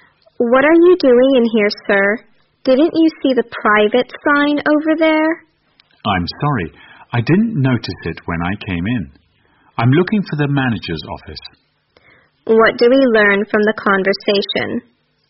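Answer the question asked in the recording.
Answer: The man went into a private area by mistake while looking for the manager's office.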